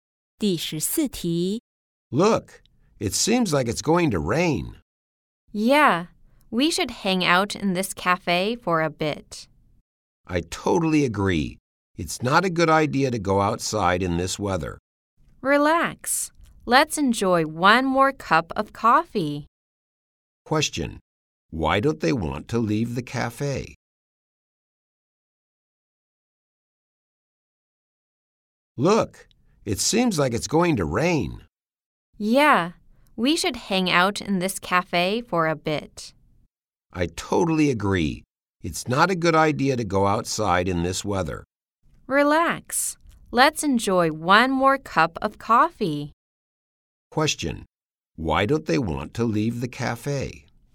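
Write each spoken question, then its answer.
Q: Question. Why don't they want to leave the cafe?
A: It seems like it's going to rain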